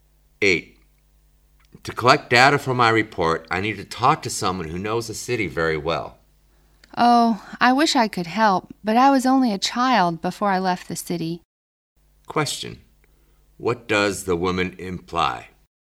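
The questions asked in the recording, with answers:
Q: What does the woman imply?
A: She doesn't know the city well, so she can't help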